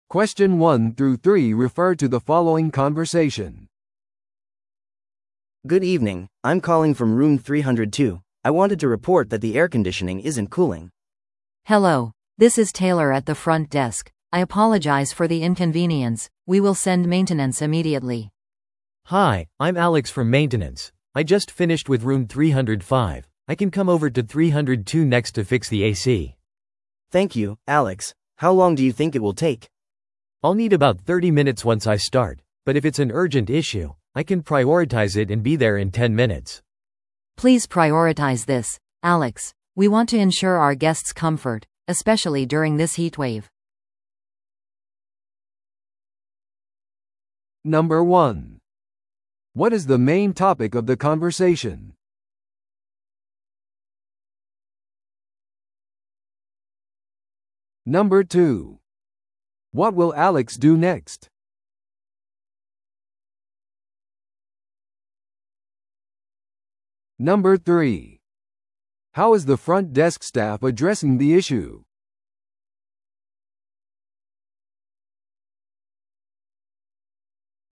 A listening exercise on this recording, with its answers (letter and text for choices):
Listen to the audio below and answer the questions.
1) What is the main topic of the conversation?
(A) ゲストのための部屋の予約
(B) 部屋のエアコンに関するクレーム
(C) ホテルイベントの手配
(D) 新しいメンテナンス担当者の任命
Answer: (B) 部屋のエアコンに関するクレーム

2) What will Alex do next?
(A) 305号室の作業を終える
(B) 302号室のエアコン修理を優先する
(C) 到着までさらに30分かかる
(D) ゲストのために別の部屋を予約する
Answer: (B) 302号室のエアコン修理を優先する

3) How is the front desk staff addressing the issue?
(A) 現在の作業が終わった後でメンテナンスを送る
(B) 謝罪して返金を提供する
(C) 朝まで苦情を無視する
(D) 修理中にゲストの快適さを優先する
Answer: (D) 修理中にゲストの快適さを優先する

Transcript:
A: Good evening, I'm calling from room 302. I wanted to report that the air conditioning isn't cooling.
B: Hello, this is Taylor at the front desk. I apologize for the inconvenience, we will send maintenance immediately.
C: Hi, I'm Alex from maintenance. I just finished with room 305. I can come over to 302 next to fix the AC.
A: Thank you, Alex. How long do you think it will take?
C: I'll need about 30 minutes once I start. But if it's an urgent issue, I can prioritize it and be there in 10 minutes.
B: Please prioritize this, Alex. We want to ensure our guest's comfort, especially during this heatwave.